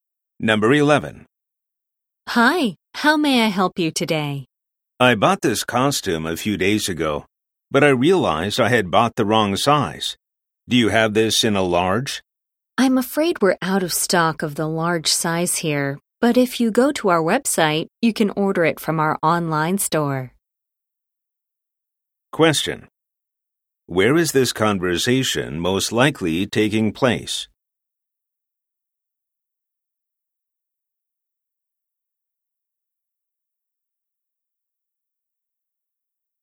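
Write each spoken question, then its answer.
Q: Where is this conversation most likely taking place?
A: At a clothing store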